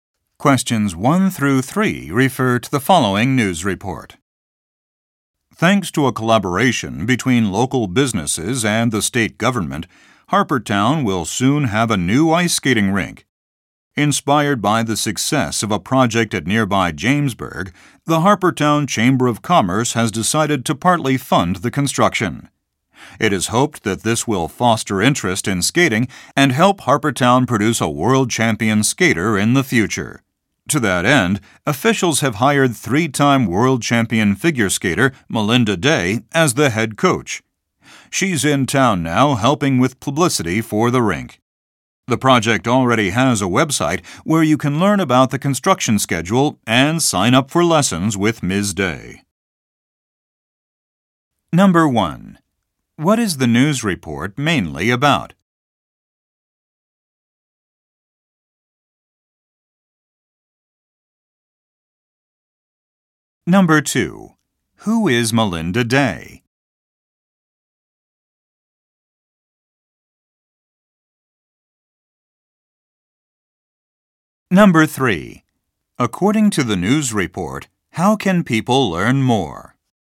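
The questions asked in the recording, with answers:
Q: What is the news report mainly about?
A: A new ice skating rink being built in Harpertown

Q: Who is Melinda Day?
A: A three-time world champion figure skater hired as head coach

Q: According to the news report, how can people learn more?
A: By visiting the project's website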